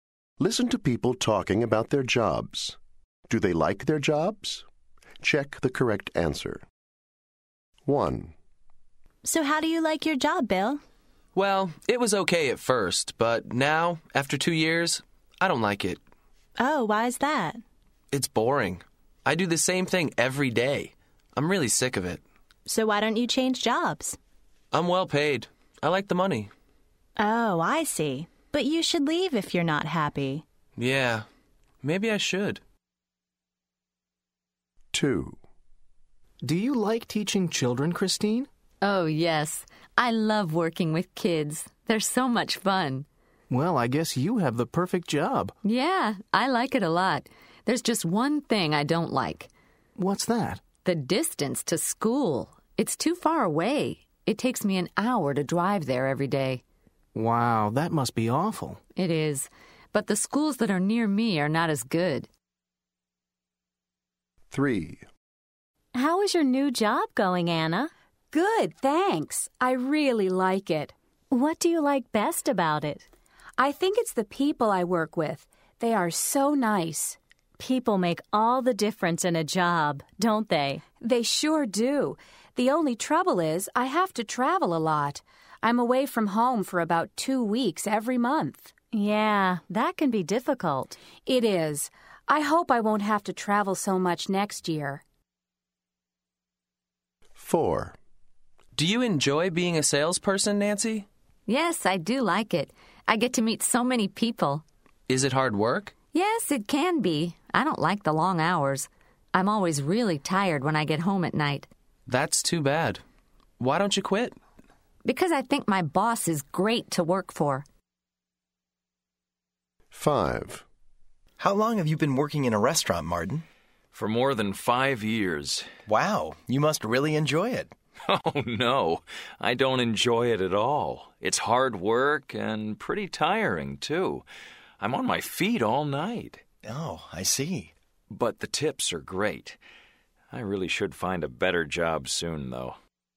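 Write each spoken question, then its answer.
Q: Do they like their jobs?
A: No, Bill doesn't like his job

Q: Do they like their jobs?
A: Yes, Christine likes her job

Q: Do they like their jobs?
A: Yes, Anna likes her job

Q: Do they like their jobs?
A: Yes, Nancy likes her job

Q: Do they like their jobs?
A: No, Martin doesn't like his job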